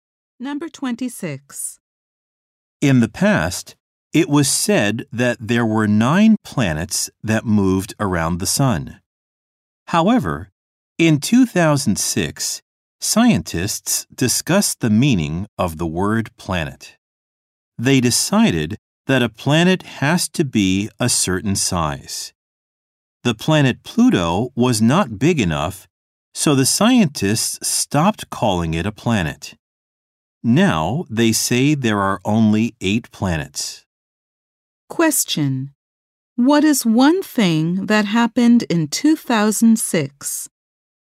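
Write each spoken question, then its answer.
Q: Question. What is one thing that happened in 2006?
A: Scientists stopped calling Pluto a planet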